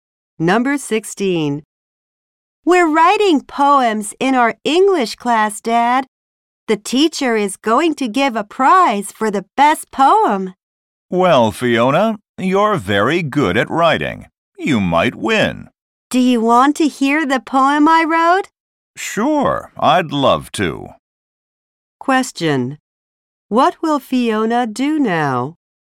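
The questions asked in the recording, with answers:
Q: What will Fiona do now?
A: Read her poem to her father.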